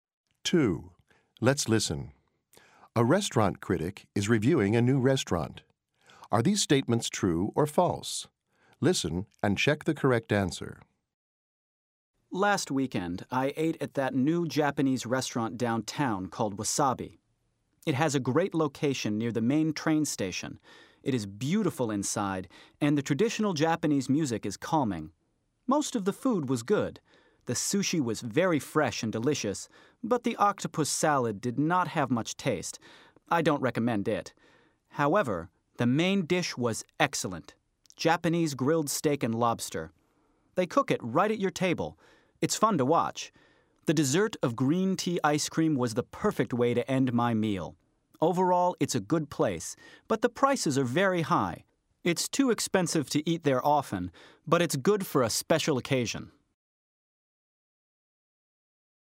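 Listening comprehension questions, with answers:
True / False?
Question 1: It has a good location.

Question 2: It is unpleasant inside.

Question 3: The critic recommends the octopus salad.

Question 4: Overall, the critic liked the restaurant.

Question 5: The prices are very reasonable.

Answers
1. True
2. False
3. False
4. True
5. False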